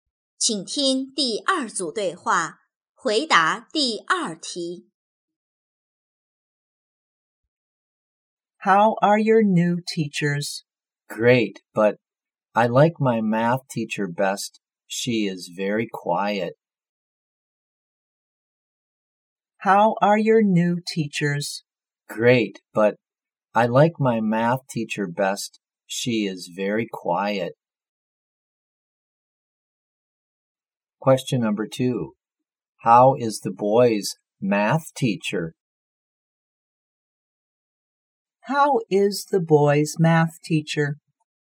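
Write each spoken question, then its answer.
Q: How is the boy's math teacher?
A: Very quiet.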